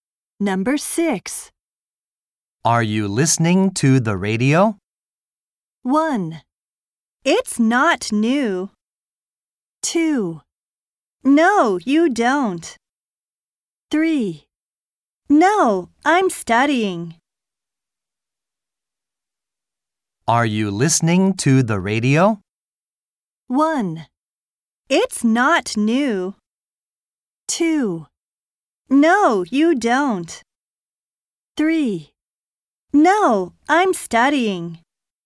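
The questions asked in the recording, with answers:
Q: Are you listening to the radio?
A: 3: No, I'm studying.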